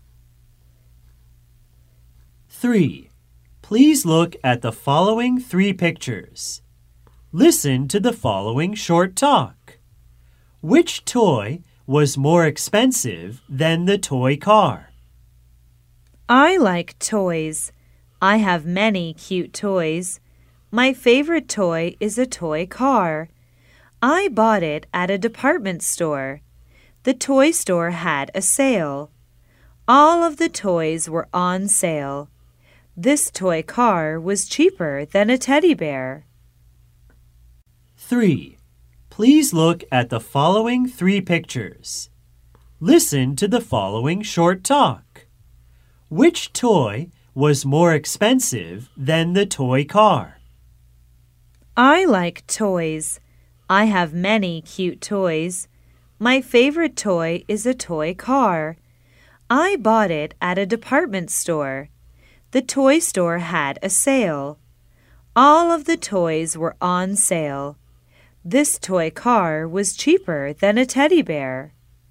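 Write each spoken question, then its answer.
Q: Which toy was more expensive than the toy car?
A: The teddy bear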